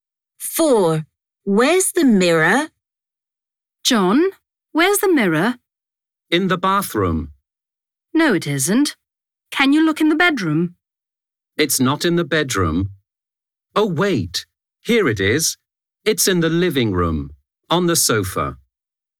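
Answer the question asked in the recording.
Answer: In the living room, on the sofa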